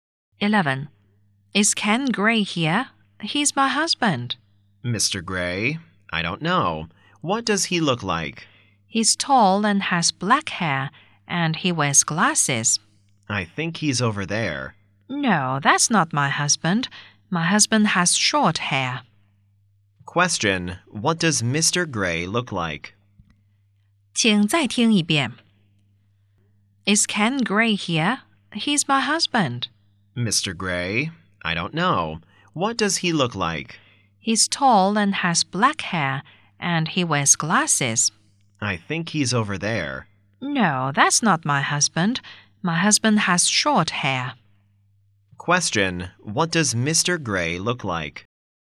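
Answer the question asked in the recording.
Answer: Tall, with short black hair and glasses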